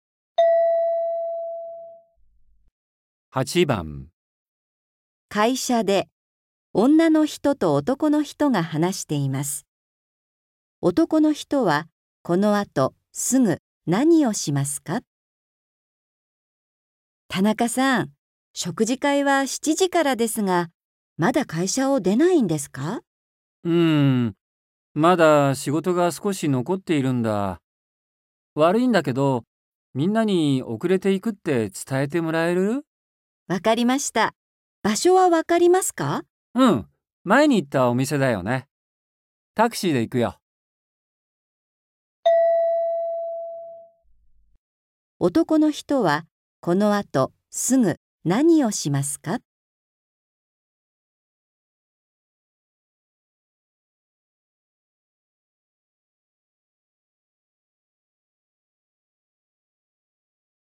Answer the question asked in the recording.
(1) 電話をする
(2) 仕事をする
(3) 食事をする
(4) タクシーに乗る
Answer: (2) 仕事をする

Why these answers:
M:うん...まだ仕事が少し残っているんだ。悪いだけど、みんなに遅れて行くって伝えてもらえる?

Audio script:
F:わかりました。場所はわかりますか。
M:うん。前に行ったお店だよね?タクシーで行くよ。
男の人は、この後すぐ何をしますか。

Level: N4